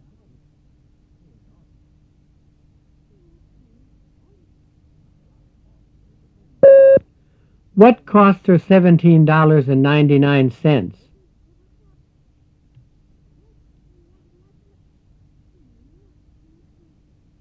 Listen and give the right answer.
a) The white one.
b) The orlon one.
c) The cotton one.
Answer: b) The orlon one.